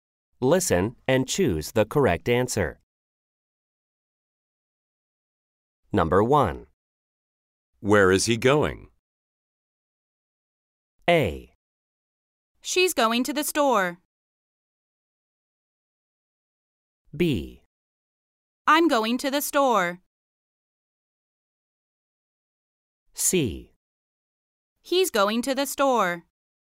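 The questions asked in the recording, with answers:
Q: Where is he going?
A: C: He's going to the store.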